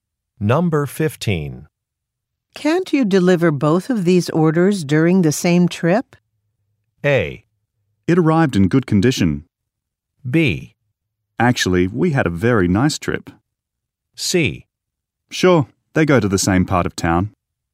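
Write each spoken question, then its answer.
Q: Can't you deliver both of these orders during the same trip?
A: C: Sure, they go to the same part of town.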